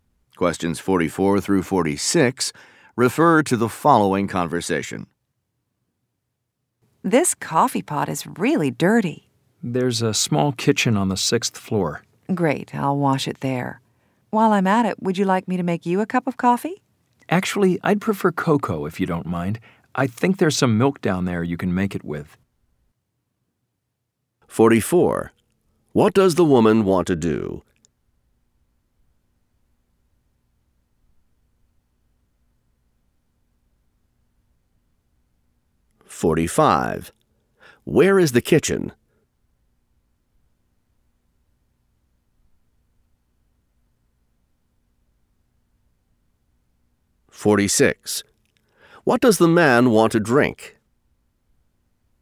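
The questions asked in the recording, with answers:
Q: Where is the kitchen?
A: On the sixth floor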